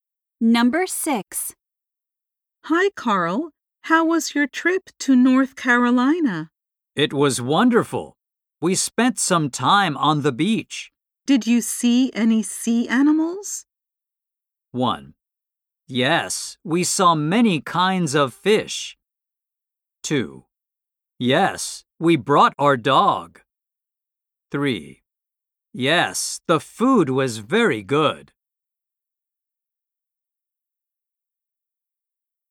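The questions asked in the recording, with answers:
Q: Did you see any sea animals?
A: 1: Yes, we saw many kinds of fish.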